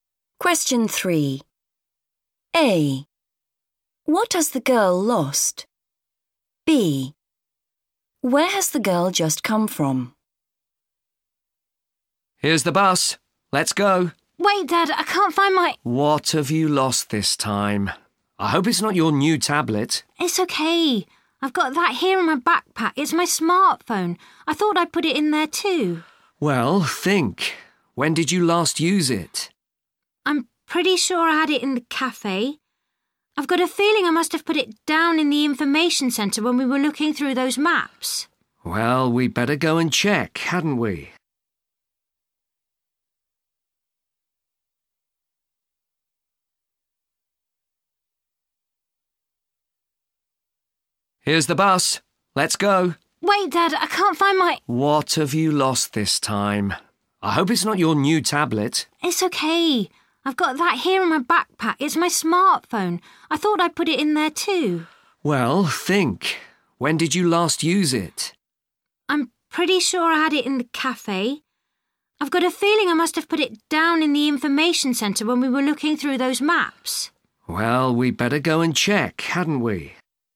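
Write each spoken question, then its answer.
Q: What has the girl lost?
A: Her smartphone

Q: Where has the girl just come from?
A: The information centre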